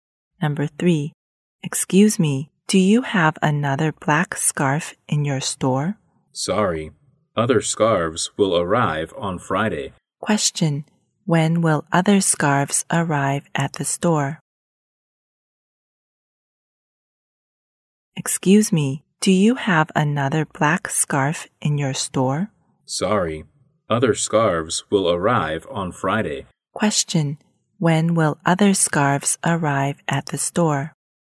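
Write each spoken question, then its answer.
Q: Question, when will other scarves arrive at the store?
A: On Friday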